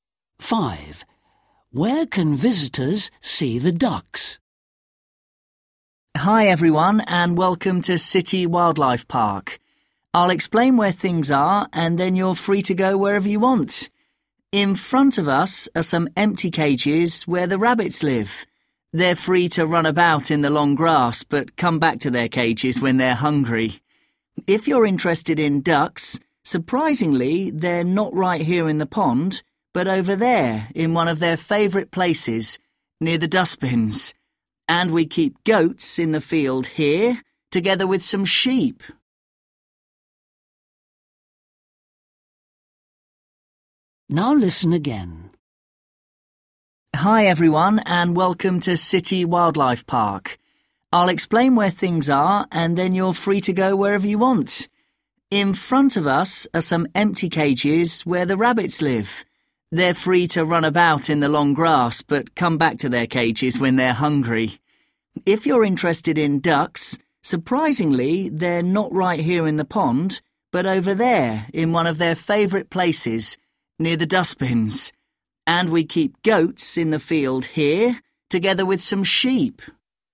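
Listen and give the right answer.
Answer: near the dustbins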